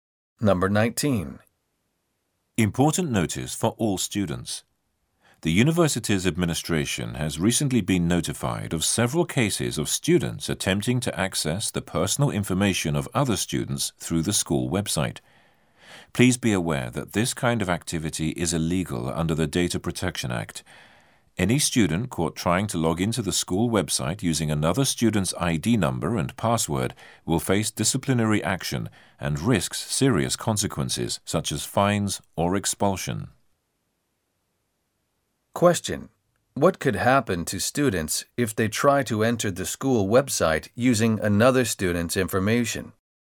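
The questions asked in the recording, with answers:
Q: Question: What could happen to students if they try to enter the school website using another student's information?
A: They could face disciplinary action such as fines or expulsion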